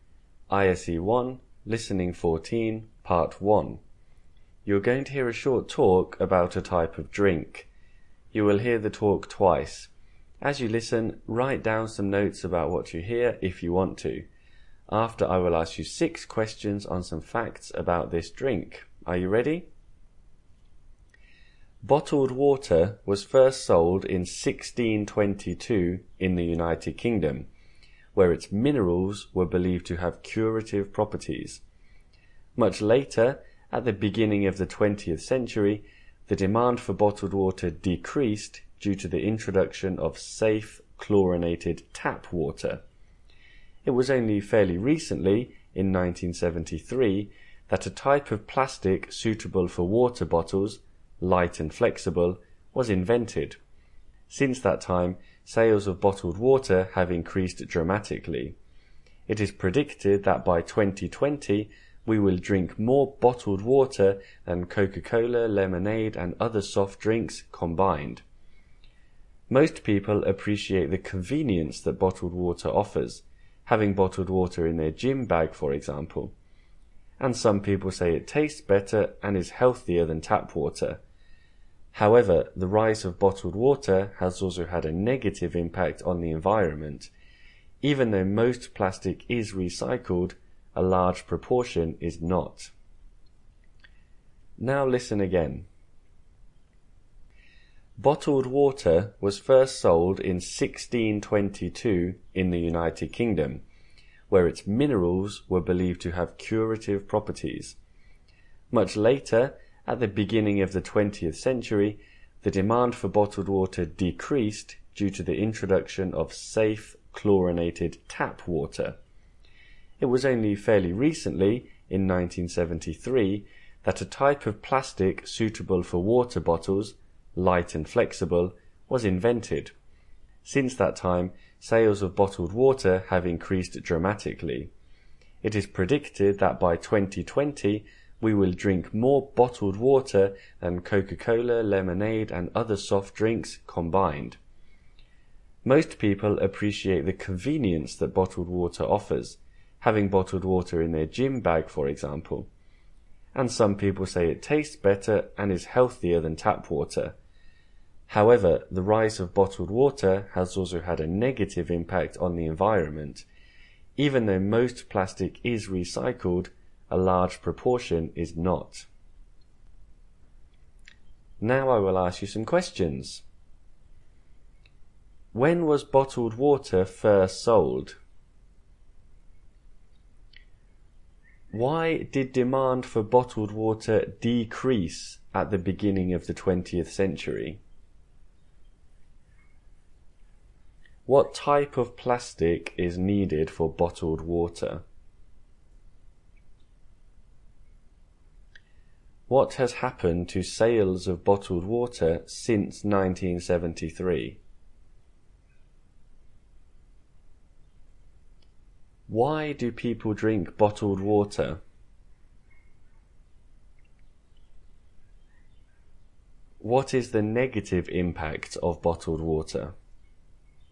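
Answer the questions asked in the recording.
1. In 1622
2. Because safe chlorinated tap water was introduced
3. Light and flexible plastic
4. They have increased dramatically
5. It is convenient, and some say it tastes better and is healthier than tap water
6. It harms the environment because a large proportion of the plastic is not recycled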